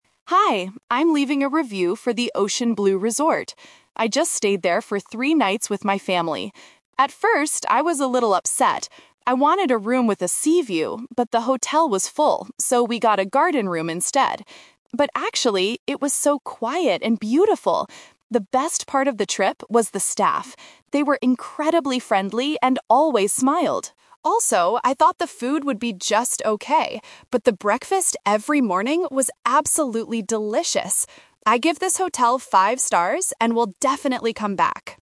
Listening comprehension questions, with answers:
Listen to a customer leaving a voice review on a travel website. Choose the correct answer (A, B, or C) for each question.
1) What kind of room did the customer actually stay in?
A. A room with a sea view.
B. A room with a garden view.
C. A room with a mountain view.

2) How did the customer feel about the hotel staff?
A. They were very friendly.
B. They were a little upset.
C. They were too slow.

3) What does the customer say about the breakfast?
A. It was just okay.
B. It was delicious.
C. It was expensive.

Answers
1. B. A room with a garden view.
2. A. They were very friendly.
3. B. It was delicious.

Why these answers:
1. The customer says, "...so we got a garden room instead." Option A is the trap: she "wanted" a sea view, but the hotel was full so she didn't get it. Option C is a plausible hotel room type but is never mentioned.
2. The customer explicitly states, "They were incredibly friendly and always smiled." Option B is the trap: the customer says "I was a little upset" at the beginning about the room, but the staff were not upset. Option C is not mentioned in the audio.
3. The customer says, "the breakfast every morning was absolutely delicious." Option A is the trap: she "thought" the food would be just okay before she ate it, but her actual experience was much better. Option C is plausible for a resort but is not mentioned.

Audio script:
Customer: Hi, I'm leaving a review for the Ocean Blue Resort. I just stayed there for three nights with my family. At first, I was a little upset. I wanted a room with a sea view, but the hotel was full, so we got a garden room instead. But actually, it was so quiet and beautiful! The best part of the trip was the staff. They were incredibly friendly and always smiled. Also, I thought the food would be just okay, but the breakfast every morning was absolutely delicious. I give this hotel five stars and will definitely come back!

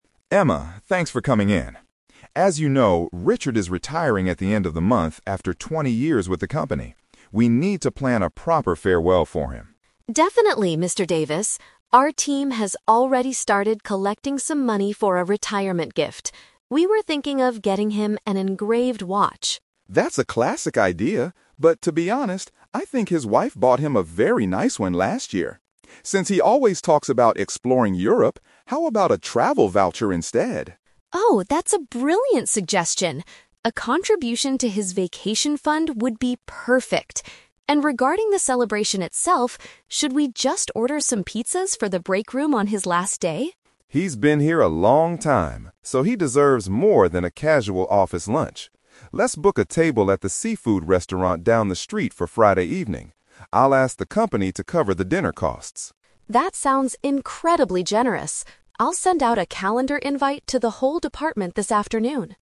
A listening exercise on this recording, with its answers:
Listen to a conversation between a manager and a team representative. Choose the best answer (A, B, or C) for each question.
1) What gift have they decided to get for Richard?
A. A customized timepiece.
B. A holiday gift certificate.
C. A traditional European souvenir.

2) How are they going to celebrate Richard's departure?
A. By having a casual pizza meal at the workplace.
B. By throwing a surprise party at his house.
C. By hosting a dinner at an outside venue.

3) What is Emma planning to do this afternoon?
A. Notify her colleagues about the upcoming event.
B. Collect more money from the team members.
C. Pay for the restaurant reservation in advance.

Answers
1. B. A holiday gift certificate.
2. C. By hosting a dinner at an outside venue.
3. A. Notify her colleagues about the upcoming event.

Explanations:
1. Mr. Davis suggests getting Richard a "travel voucher," and Emma agrees it is a brilliant idea for his "vacation fund." Paraphrasing: travel voucher = holiday gift certificate. Trap: Option A is a trap. Emma initially suggested an "engraved watch" (customized timepiece), but Mr. Davis rejected it because Richard's wife already bought him one. Option C is a distractor because Europe is mentioned as a travel destination, not a place to buy souvenirs from.
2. Mr. Davis says they should "book a table at the seafood restaurant down the street for Friday evening." This means they will eat at an outside venue instead of the office. Trap: Option A is exactly what Emma suggested ("order some pizzas for the breakroom"), but Mr. Davis rejected this idea because Richard deserves more. Option B is not mentioned at all.
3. Emma states at the end that she will "send out a calendar invite to the whole department." This action means she is notifying her coworkers about the party. Trap: Option B is incorrect because she mentions earlier that the team has "already started collecting some money" (it's an action in the past, not what she will do this afternoon). Option C is a trap because Mr. Davis said the company will "cover the dinner costs," so Emma doesn't need to pay.

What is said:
Mr. Davis: Emma, thanks for coming in. As you know, Richard is retiring at the end of the month after twenty years with the company. We need to plan a proper farewell for him.
Emma: Definitely, Mr. Davis. Our team has already started collecting some money for a retirement gift. We were thinking of getting him an engraved watch.
Mr. Davis: That's a classic idea, but to be honest, I think his wife bought him a very nice one last year. Since he always talks about exploring Europe, how about a travel voucher instead?
Emma: Oh, that's a brilliant suggestion! A contribution to his vacation fund would be perfect. And regarding the celebration itself, should we just order some pizzas for the breakroom on his last day?
Mr. Davis: He's been here a long time, so he deserves more than a casual office lunch. Let's book a table at the seafood restaurant down the street for Friday evening. I'll ask the company to cover the dinner costs.
Emma: That sounds incredibly generous. I'll send out a calendar invite to the whole department this afternoon.

